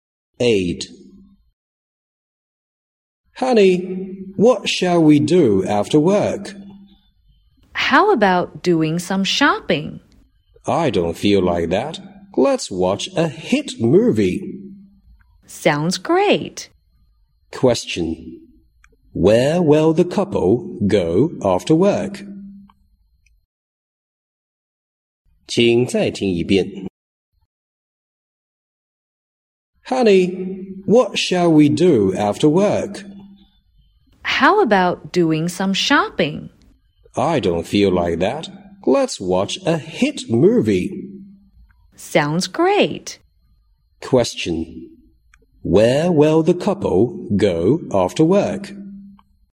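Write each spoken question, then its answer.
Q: Where will the couple go after work?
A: To the cinema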